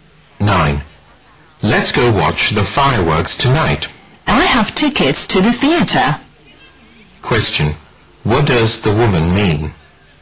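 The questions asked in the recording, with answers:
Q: What does the woman mean?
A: She can't go; she is going to the theater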